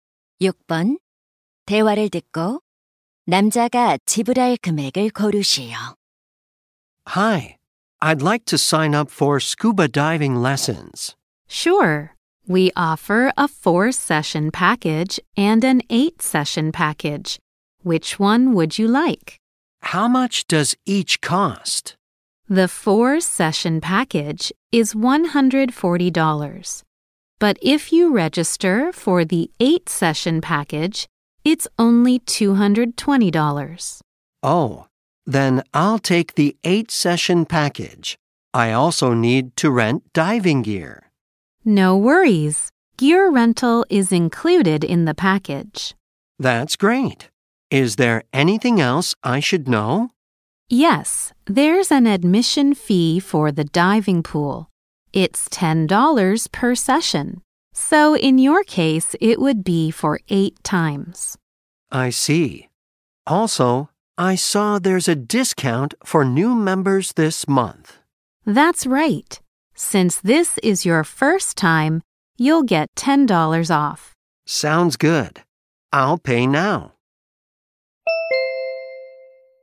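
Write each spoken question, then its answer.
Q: 대화를 듣고 남자가 지불할 금액을 고르시오.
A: 290달러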